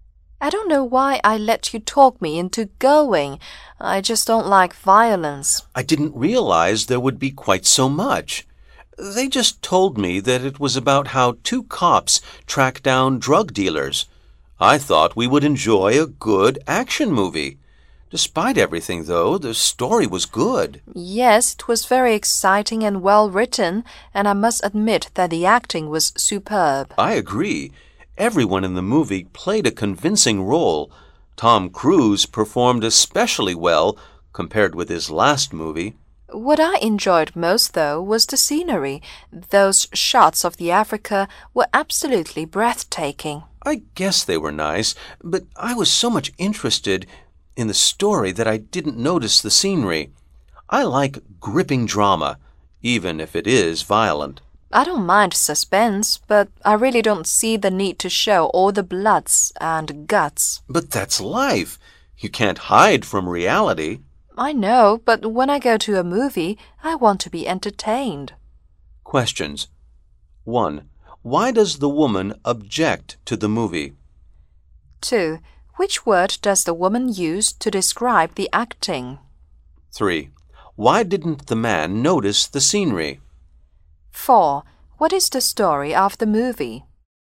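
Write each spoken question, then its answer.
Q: Why does the woman object to the movie?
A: It has too much violence

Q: Which word does the woman use to describe the acting?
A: Superb

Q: Why didn't the man notice the scenery?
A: He was too interested in the story

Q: What is the story of the movie?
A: Two cops tracking down drug dealers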